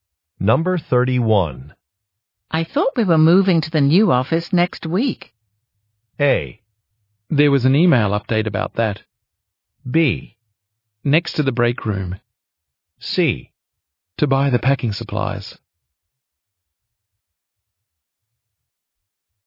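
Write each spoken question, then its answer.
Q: I thought we were moving to the new office next week.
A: A: There was an email update about that.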